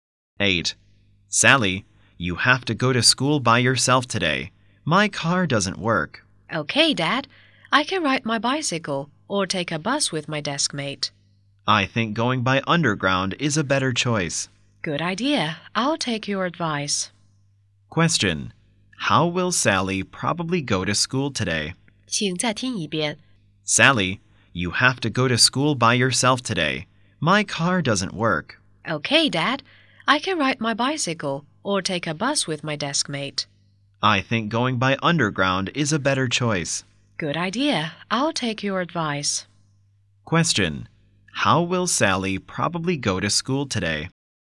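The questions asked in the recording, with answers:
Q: Question. How will Sally probably go to school today?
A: By underground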